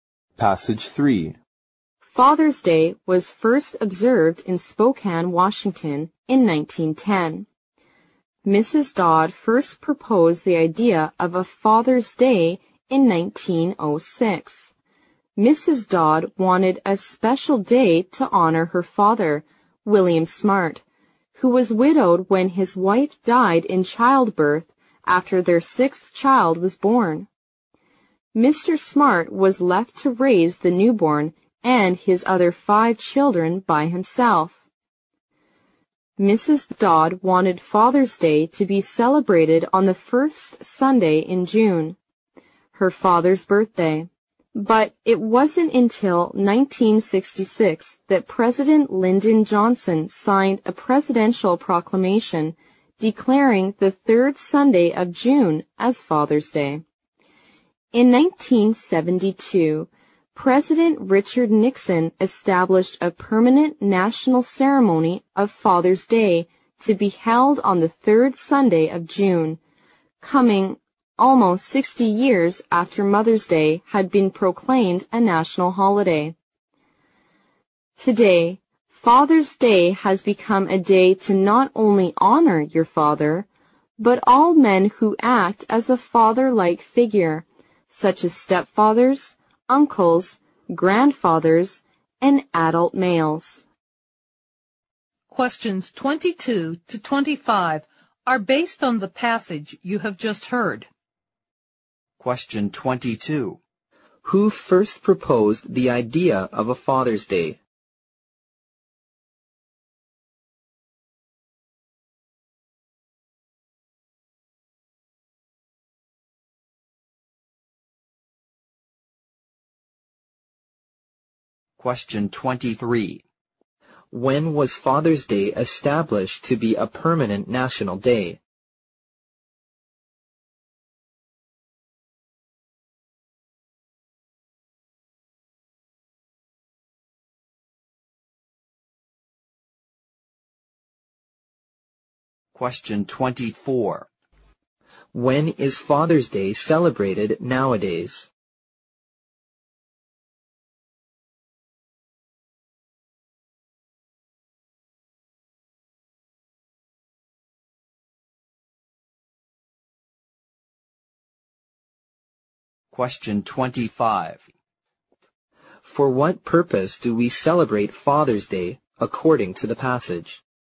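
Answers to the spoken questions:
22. Mrs. Dodd
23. In 1972
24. On the third Sunday of June
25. To honor fathers and all father-like men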